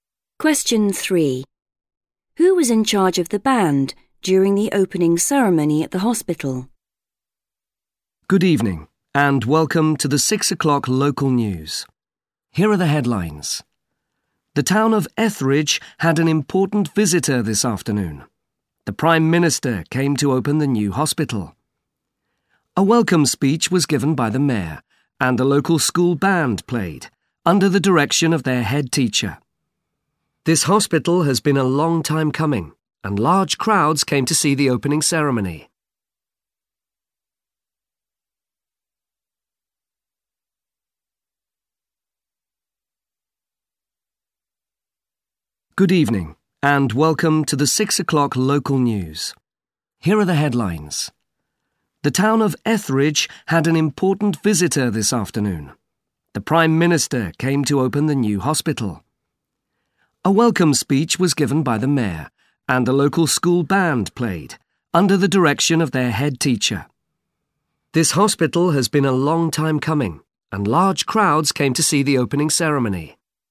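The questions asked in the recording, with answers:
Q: Who was in charge of the band during the opening ceremony at the hospital?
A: The head teacher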